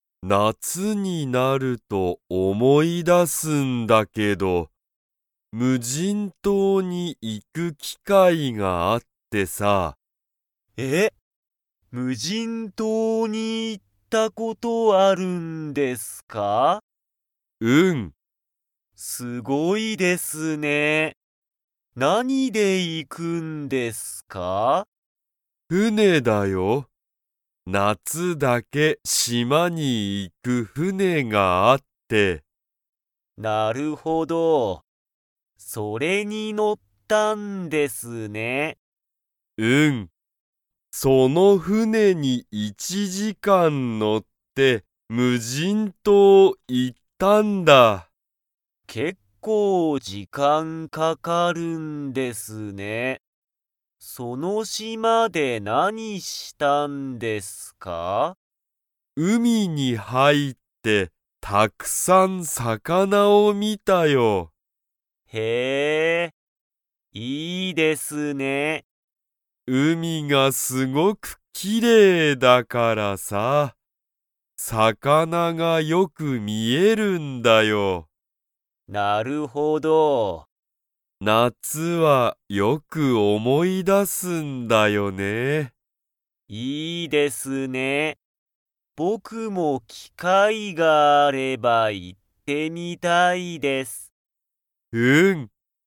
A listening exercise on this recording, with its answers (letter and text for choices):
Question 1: 田中たなかさんは、無人島むじんとうに 。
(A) 行いったことがある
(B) 行いったことがない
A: (A) 行いったことがある

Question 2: 田中たなかさんは、海うみに入はいって何なにを見みましたか?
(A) 魚さかな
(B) 船ふね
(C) 夏なつ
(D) 機会きかい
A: (A) 魚さかな

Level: Level 3